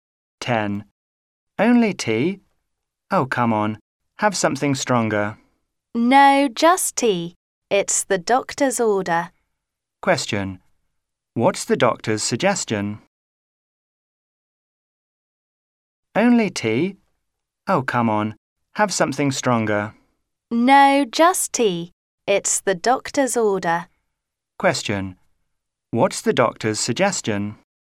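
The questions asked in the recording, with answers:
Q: What's the doctor's suggestion?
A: To drink only tea, nothing stronger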